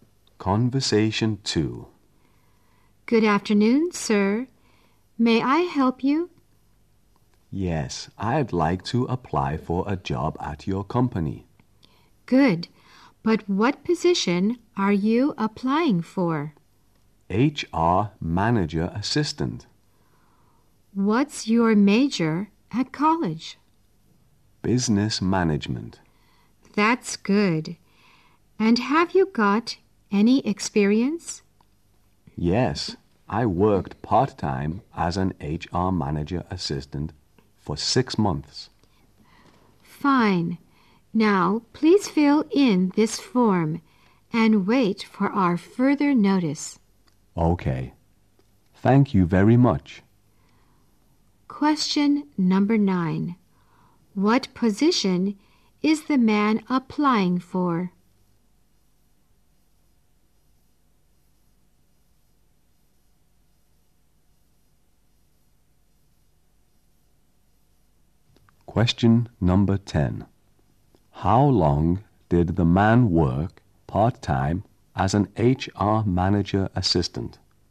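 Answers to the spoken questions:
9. HR Manager Assistant.
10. 6 months.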